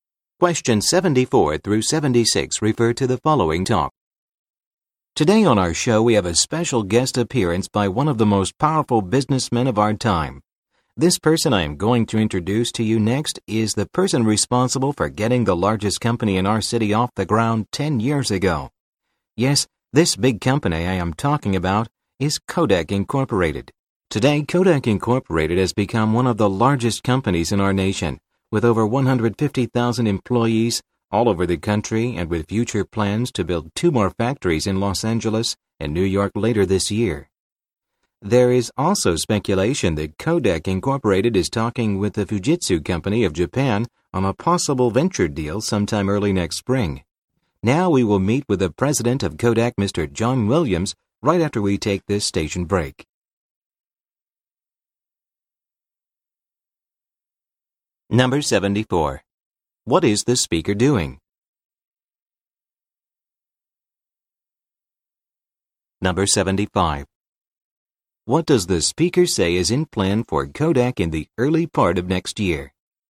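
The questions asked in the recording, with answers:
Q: What is the speaker doing?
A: Introducing a guest on a show

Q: What does the speaker say is in plan for Kodak in the early part of next year?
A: A possible venture deal with Fujitsu of Japan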